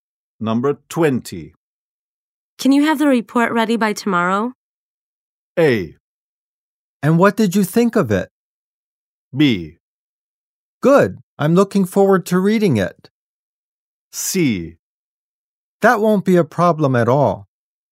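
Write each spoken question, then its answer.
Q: Can you have the report ready by tomorrow?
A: C: That won't be a problem at all.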